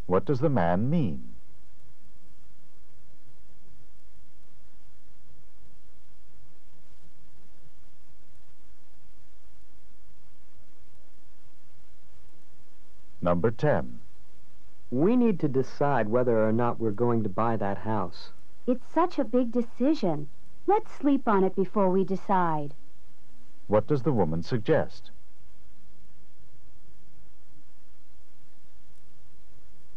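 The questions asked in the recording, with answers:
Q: What does the woman suggest?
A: Waiting until tomorrow to decide.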